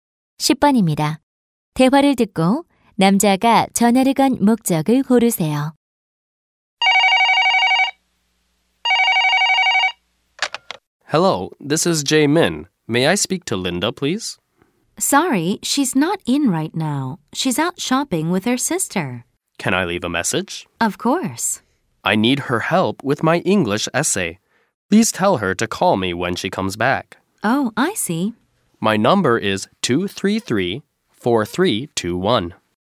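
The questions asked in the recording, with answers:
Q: 대화를 듣고 남자가 전화를 건 목적을 고르세요.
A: 영어 에세이 도움을 부탁하려고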